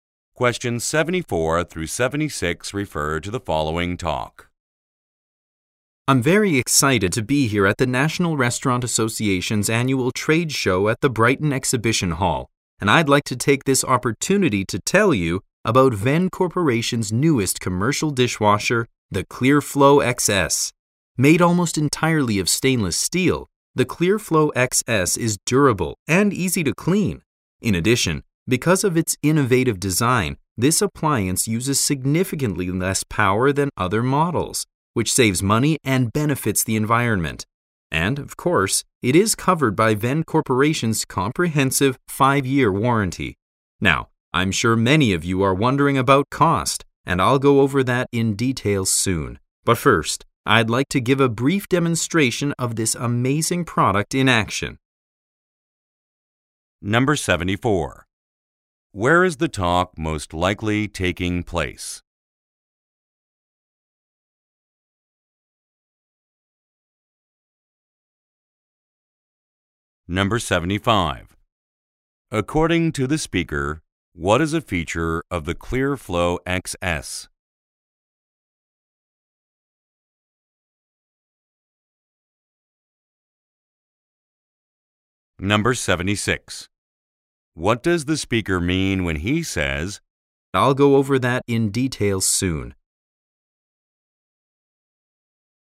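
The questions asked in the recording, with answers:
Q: Where is the talk most likely taking place?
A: At a trade show

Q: What does the speaker mean when he says,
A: He will discuss the price later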